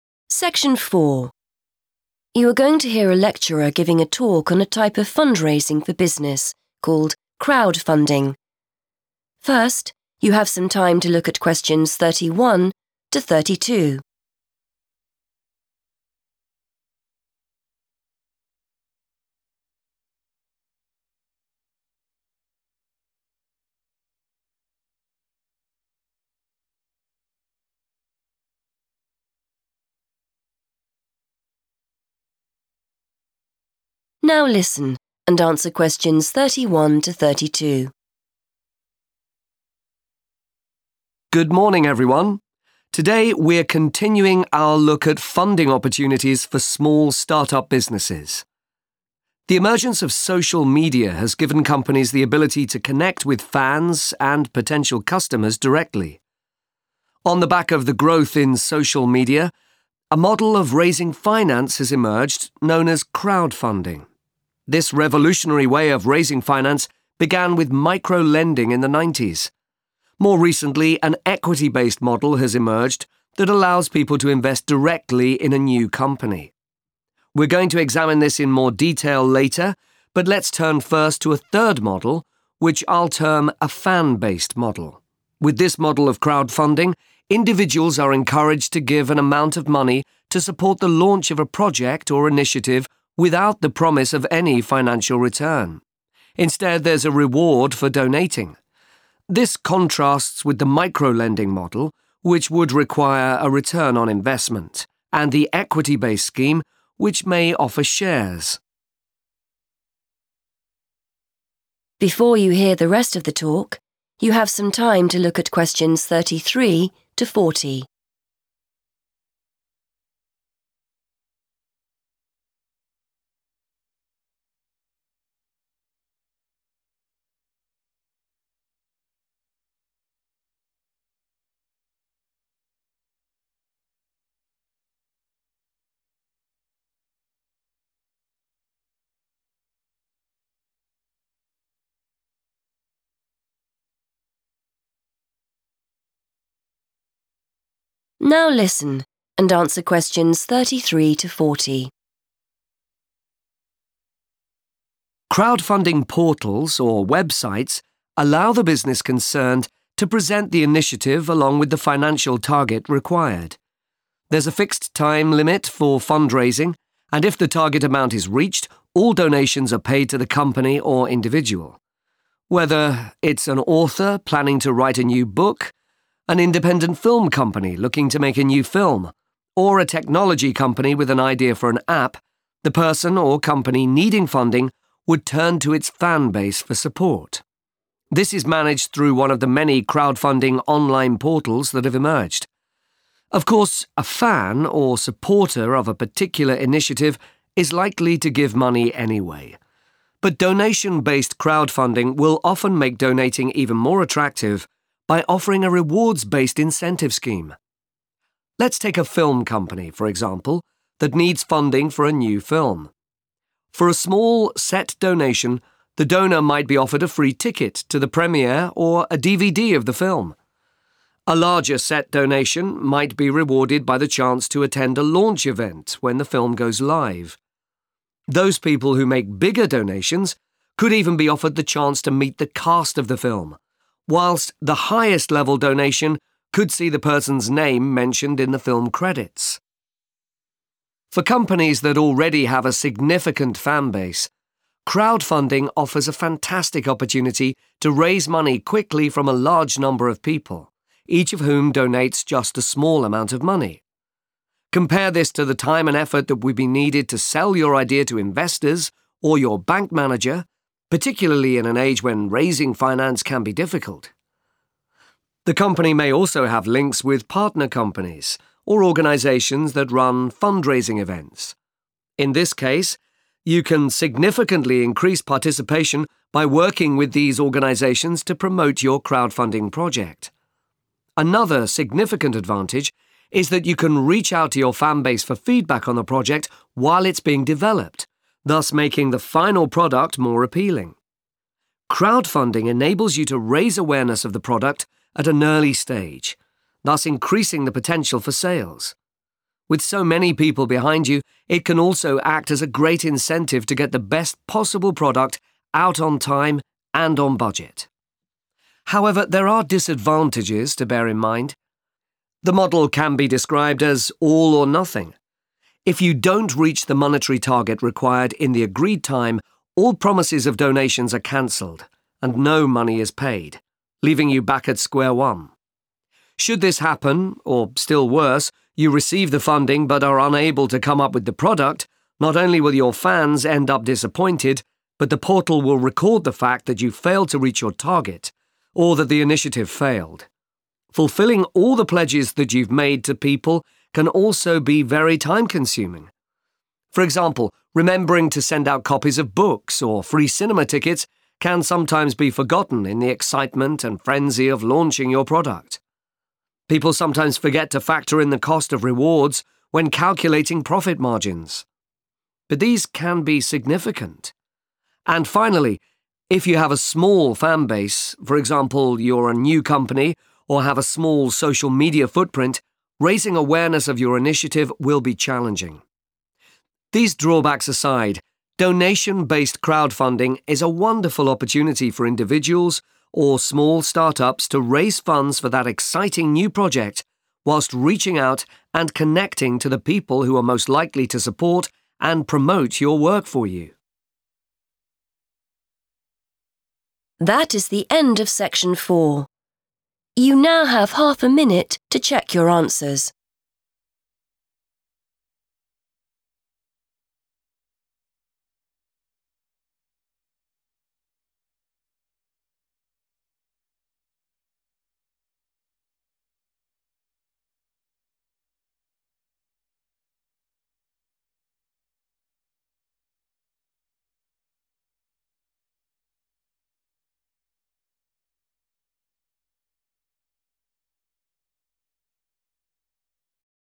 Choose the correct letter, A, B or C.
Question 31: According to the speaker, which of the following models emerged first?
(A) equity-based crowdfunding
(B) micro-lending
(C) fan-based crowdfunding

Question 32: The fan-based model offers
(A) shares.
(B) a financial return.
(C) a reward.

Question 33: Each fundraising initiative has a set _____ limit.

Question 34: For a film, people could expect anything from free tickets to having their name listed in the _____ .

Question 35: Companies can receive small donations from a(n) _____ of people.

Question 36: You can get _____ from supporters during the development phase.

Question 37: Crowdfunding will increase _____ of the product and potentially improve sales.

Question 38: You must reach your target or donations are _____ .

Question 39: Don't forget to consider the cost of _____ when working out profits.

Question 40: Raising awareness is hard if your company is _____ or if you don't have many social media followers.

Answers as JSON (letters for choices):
{"31": "B", "32": "C", "33": "time", "34": "film credits", "35": "large number", "36": "feedback", "37": "awareness", "38": "cancelled", "39": "rewards", "40": "new"}

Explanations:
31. The correct answer is B because the lecturer provides a timeline for different crowdfunding models. According to the transcript, crowdfunding started with micro-lending in the 1990s. The speaker then mentions that the equity-based model appeared "more recently," indicating it came after micro-lending. While the fan-based model is described in detail during the talk, the historical starting point is explicitly linked to micro-lending.
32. The correct answer is 'a reward' because the text explains how the 'fan-based model' works for people giving money. It says that fans do not get a 'financial return' (making profit) or 'shares' (owning a part of the business). Instead, they receive a 'reward' as a way to say thank you for their help. Examples of rewards mentioned include free tickets, a copy of a movie, or a name in the credits.
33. The correct answer is 'time' because the transcript states that there is a 'fixed time limit' for fundraising projects. In this context, 'fixed' means the same thing as 'set' in the sentence. This means the crowdfunding website gives you a certain amount of days or weeks to reach your goal.
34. The correct answer is found in the section where the speaker explains rewards for donating money to a movie project. The speaker says that for the largest donation, a person can have their name 'mentioned' – which means the same as 'listed' in the question – in the 'film credits'.
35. The correct answer is 'large number' because the text explains that crowdfunding allows companies to collect money from many supporters at the same time. Instead of getting a lot of money from one person, they get a small amount from many different people. The phrase 'large number' correctly completes the sentence about where these small donations come from.
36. The correct answer is "feedback" because the lecturer mentions that companies can ask their supporters—referred to in the talk as their "fan base"—for their ideas while the project is still "being developed" (the development phase). This helps the company understand what people want so the final version is better.
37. The correct answer is derived from the lecturer's explanation of how crowdfunding benefits a company. According to the transcript, crowdfunding helps a business show its product to people early in the process. This makes more people know about it, which 'increases the potential for sales.' The transcript uses the phrase 'raise awareness,' which matches the idea of increasing it in the task sentence.
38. The correct answer is correct because the lecturer describes crowdfunding as 'all or nothing'. This means that if a project fails to meet its financial goal (the 'monetary target') within the set time limit, the 'promises of donations' (the money people said they would give) are 'cancelled'. If this happens, the person or company gets no money at all.
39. The correct answer is correct because the lecturer warns that business owners often forget to include the money they spend on these gifts when they are calculating their profit margins. It is important to factor in these costs because they can be quite large and affect how much money the business actually makes.
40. The correct answer is supported by the final section of the text, which discusses the difficulties of crowdfunding. It explains that making people aware of a project is hard (or "challenging") if the business is brand new or does not have a strong presence on social media.

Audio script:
Lecturer: Good morning, everyone. Today we're continuing our look at funding opportunities for small start-up businesses. The emergence of social media has given companies the ability to connect with fans and potential customers directly. On the back of the growth in social media, a model of raising finance has emerged known as crowdfunding. This revolutionary way of raising finance began with micro-lending in the nineties. More recently an equity-based model has emerged that allows people to invest directly in a new company. We're going to examine this in more detail later, but let's turn first to a third model, which I'll term a fan-based model.
With this model of crowdfunding, individuals are encouraged to give an amount of money to support the launch of a project or initiative without the promise of any financial return. Instead, there's a reward for donating. This contrasts with the micro-lending model, which would require a return on investment, and the equity-based scheme, which may offer shares. Crowdfunding portals or websites allow the business concerned to present the initiative along with the financial target required. There's a fixed time limit for fundraising and if the target amount is reached, all donations are paid to the company or individual. Whether it's an author planning to write a new book, an independent film company looking to make a new film, or a technology company with an idea for an app, the person or company needing funding would turn to its fan base for support. This is managed through one of the many crowdfunding online portals that have emerged.
Of course, a fan or supporter of a particular initiative is likely to give money anyway. But donation-based crowdfunding will often make donating even more attractive by offering a rewards-based incentive scheme. Let's take a film company, for example, that needs funding for a new film. For a small set donation, the donor might be offered a free ticket to the premiere or a DVD of the film. A larger set donation might be rewarded by the chance to attend a launch event when the film goes live. Those people who make bigger donations could even be offered the chance to meet the cast of the film, whilst the highest level donation could see the person's name mentioned in the film credits.
For companies that already have a significant fan base, crowdfunding offers a fantastic opportunity to raise money quickly from a large number of people, each of whom donates just a small amount of money. Compare this to the time and effort that would be needed to sell your idea to investors or your bank manager, particularly in an age when raising finance can be difficult. The company may also have links with partner companies or organisations that run fundraising events. In this case, you can significantly increase participation by working with these organisations to promote your crowdfunding project. Another significant advantage is that you can reach out to your fan base for feedback on the project while it's being developed, thus making the final product more appealing. Crowdfunding enables you to raise awareness of the product at an early stage, thus increasing the potential for sales. With so many people behind you, it can also act as a great incentive to get the best possible product out on time and on budget.
However, there are disadvantages to bear in mind. The model can be described as 'all or nothing'. If you don't reach the monetary target required in the agreed time, all promises of donations are cancelled and no money is paid, leaving you back at square one. Should this happen, or still worse, you receive the funding but are unable to come up with the product, not only will your fans end up disappointed but the portal will record the fact that you failed to reach your target or that the initiative failed. Fulfilling all the pledges that you've made to people can also be very time-consuming. For example, remembering to send out copies of books or free cinema tickets can sometimes be forgotten in the excitement and frenzy of launching your product. People sometimes forget to factor in the cost of rewards when calculating profit margins, but these can be significant. And finally, if you have a small fan base, for example you're a new company or have a small social media footprint, raising awareness of your initiative will be challenging.
These drawbacks aside, donation-based crowdfunding is a wonderful opportunity for individuals or small start-ups to raise funds for that exciting new project whilst reaching out and connecting to the people who are most likely to support and promote your work for you.